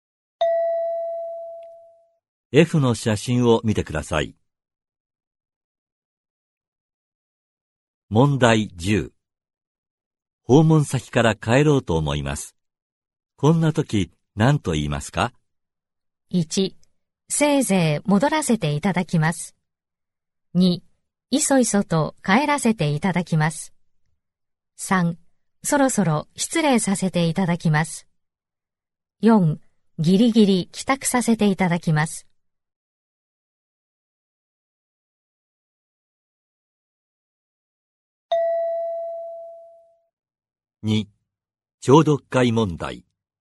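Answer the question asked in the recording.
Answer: 3: そろそろ失礼させていただきます。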